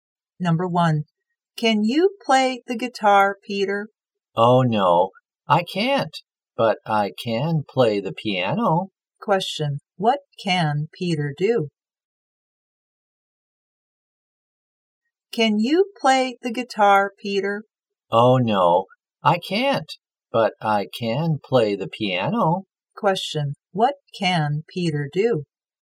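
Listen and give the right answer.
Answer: He can play the piano.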